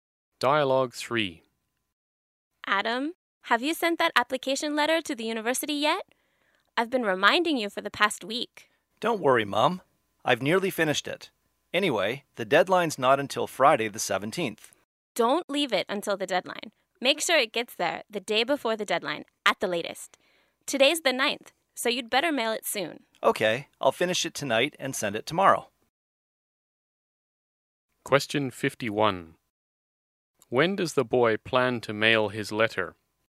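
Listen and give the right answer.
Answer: Tomorrow, the 10th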